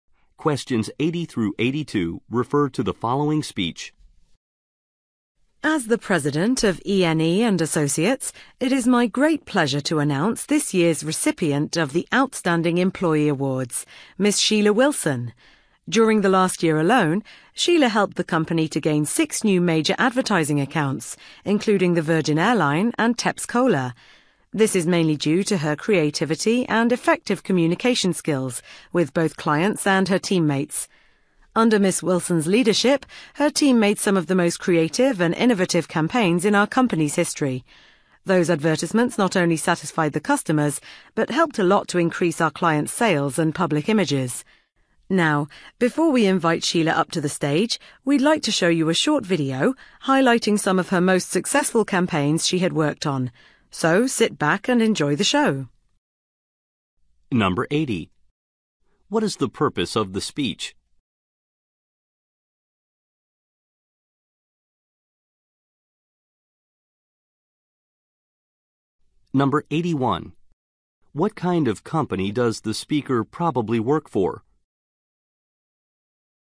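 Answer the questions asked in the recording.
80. To present an Outstanding Employee Award
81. An advertising agency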